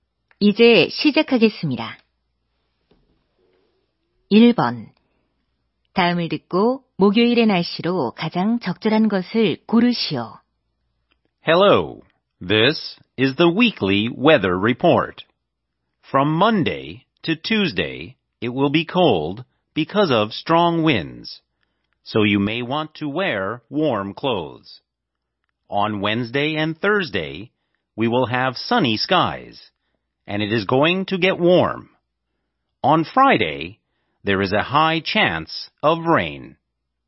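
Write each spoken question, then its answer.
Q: 다음을 듣고 목요일의 날씨로 가장 적절한 것을 고르시오.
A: 맑고 따뜻함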